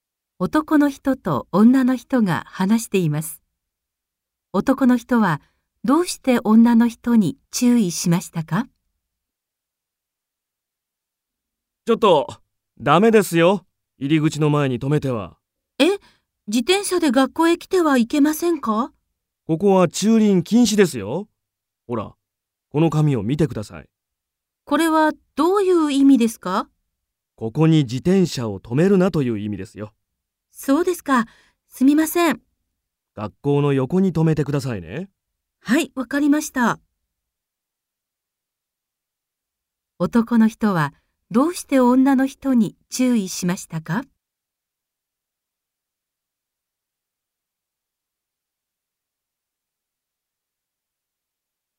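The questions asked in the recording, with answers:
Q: 男の人はどうして女の人に注意しましたか?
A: 駐輪禁止の入り口の前に自転車を止めたから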